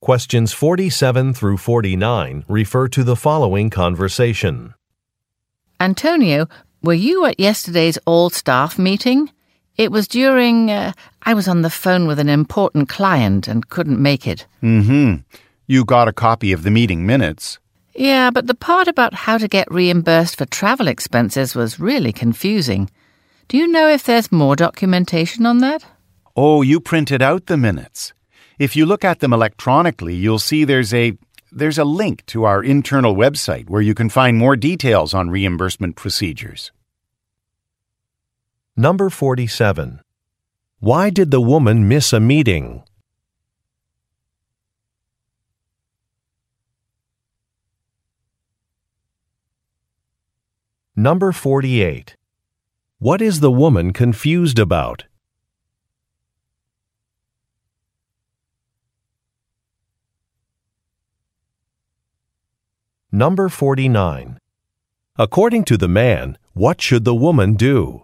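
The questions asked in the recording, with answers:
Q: Why did the woman miss a meeting?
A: She was on the phone with an important client.

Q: What is the woman confused about?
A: How to get reimbursed for travel expenses.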